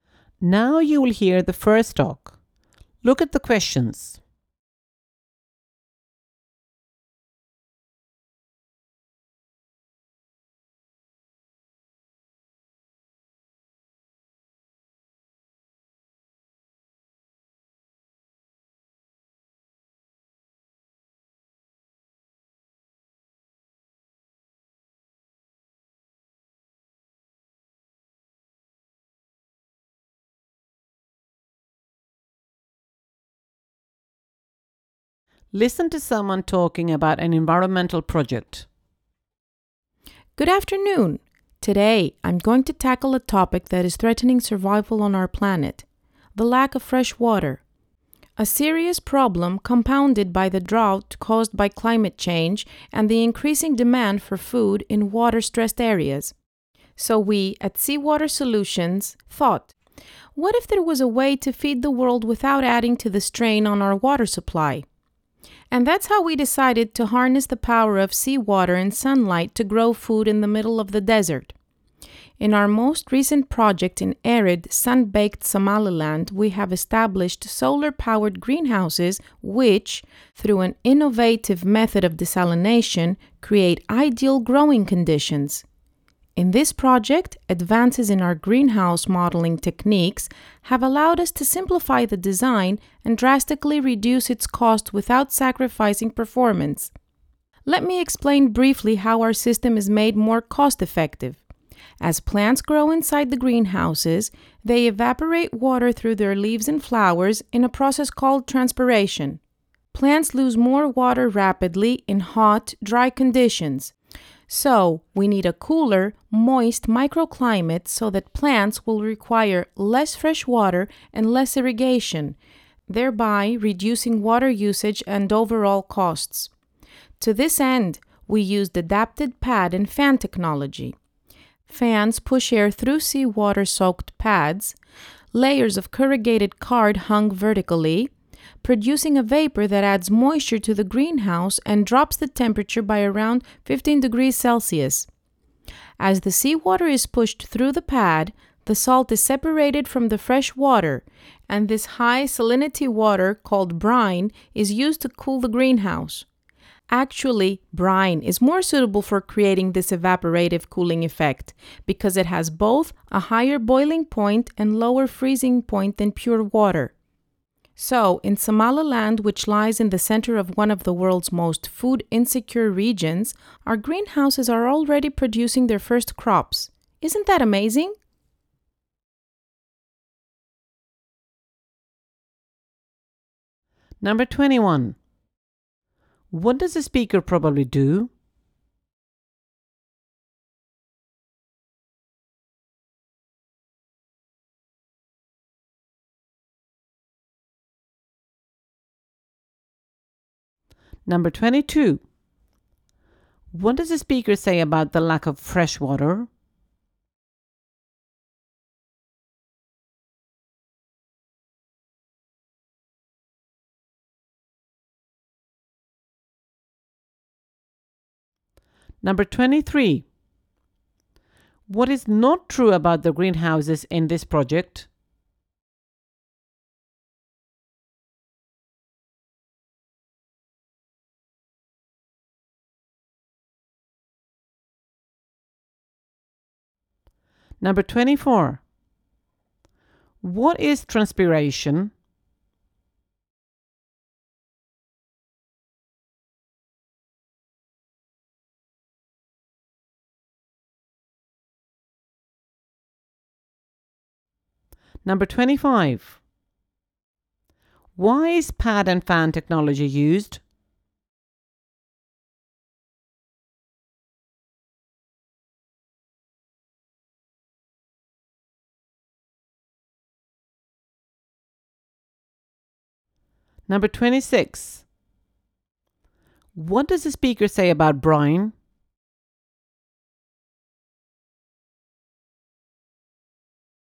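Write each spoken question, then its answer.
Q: What is transpiration?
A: Plants evaporating water through their leaves and flowers

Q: Why is pad and fan technology used?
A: To create a cooler, moist microclimate so plants need less fresh water

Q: What does the speaker say about Brian?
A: Brine is better for evaporative cooling because it has a higher boiling point and a lower freezing point than pure water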